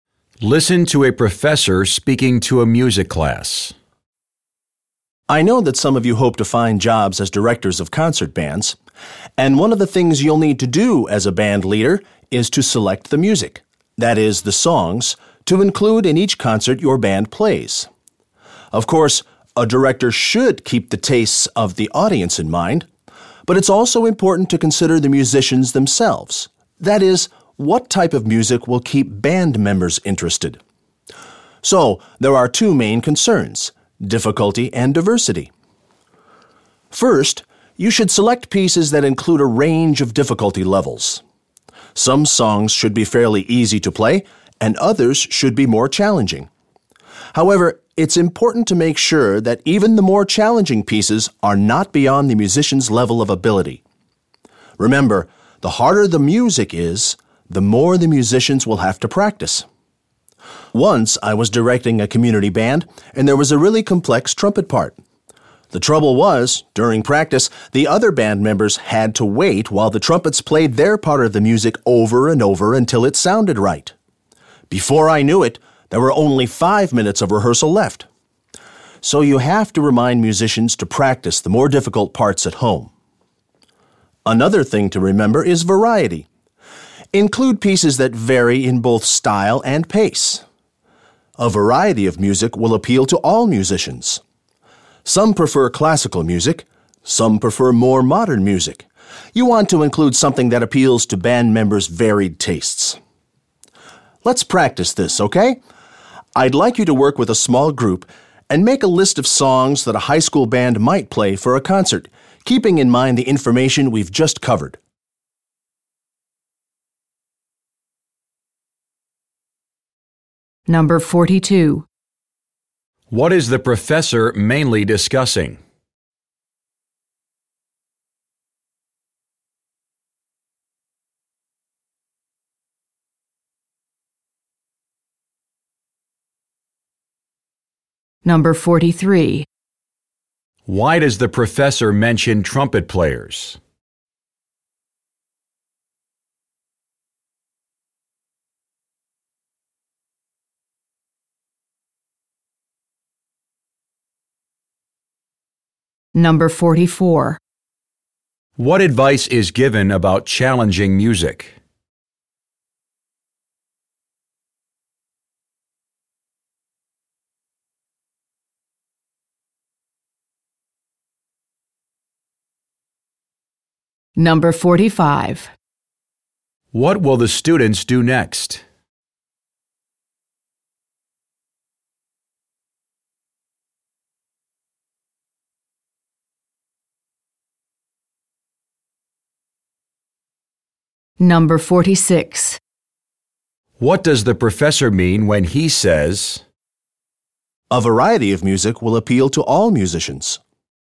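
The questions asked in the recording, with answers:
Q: What is the professor mainly discussing?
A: How to choose music for a band concert

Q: What will the students do next?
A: Work in small groups to make a list of songs for a high school band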